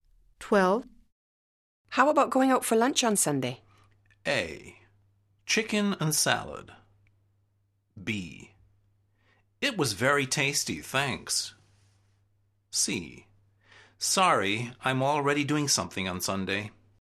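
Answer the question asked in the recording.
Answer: C: Sorry, I'm already doing something on Sunday.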